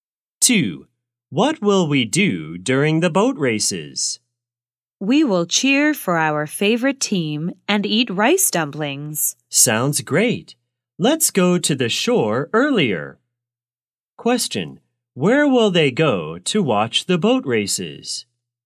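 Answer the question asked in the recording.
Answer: To the shore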